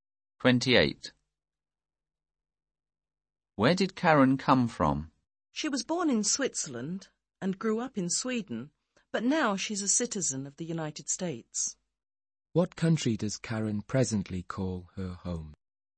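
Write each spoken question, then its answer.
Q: What country does Karen presently call her home?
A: The United States.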